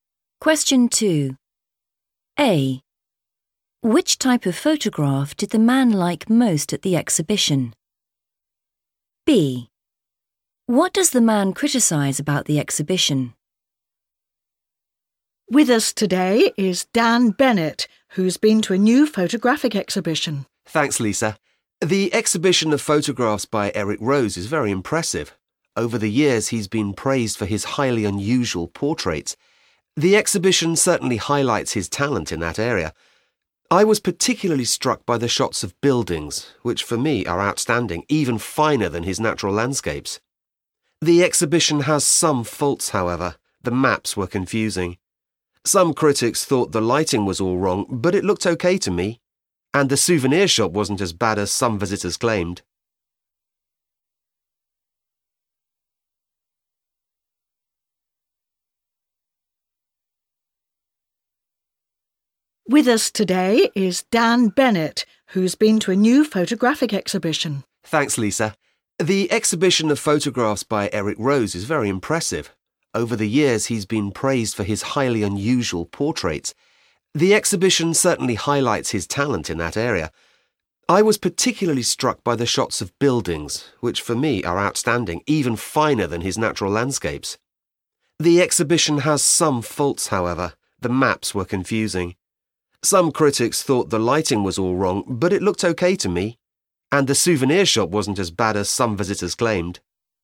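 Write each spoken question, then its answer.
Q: Which type of photograph did the man like most at the exhibition?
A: shots of buildings

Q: What does the man criticise about the exhibition?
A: the maps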